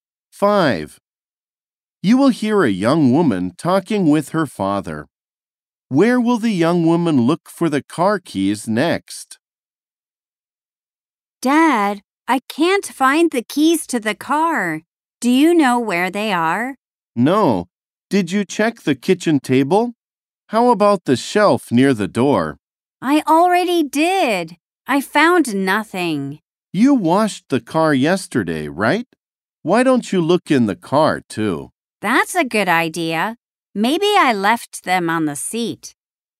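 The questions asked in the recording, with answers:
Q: Where will the young woman look for the car keys next?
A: In the car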